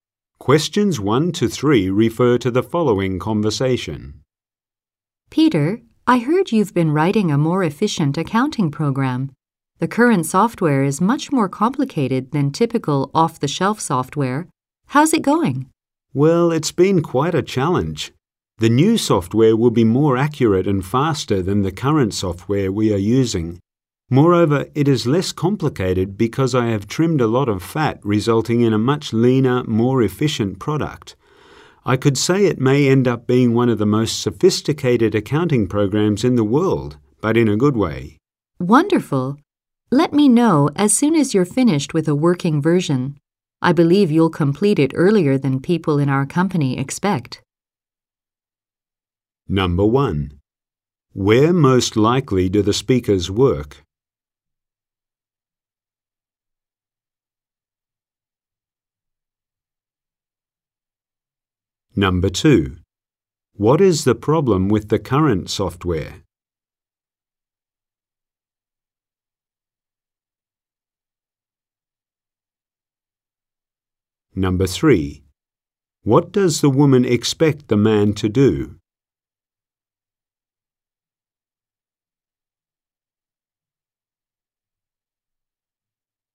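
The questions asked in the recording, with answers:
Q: What is the problem with the current software?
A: It is too complicated

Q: What does the woman expect the man to do?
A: Finish the program earlier than expected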